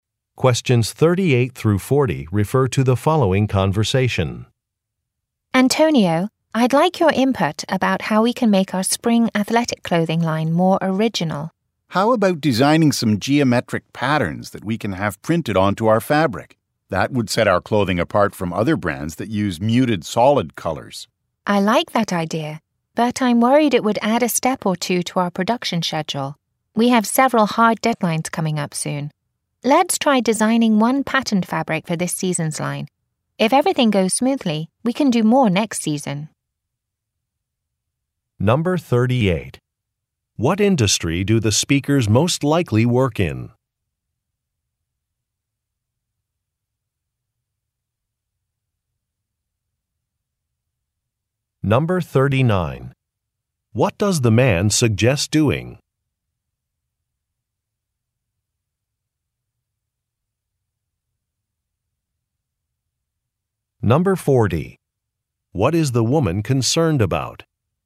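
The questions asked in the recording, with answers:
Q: What industry do the speakers most likely work in?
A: Clothing (athletic apparel)

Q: What does the man suggest doing?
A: Printing geometric patterns onto their fabric

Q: What is the woman concerned about?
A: It would add steps to the production schedule, with deadlines coming up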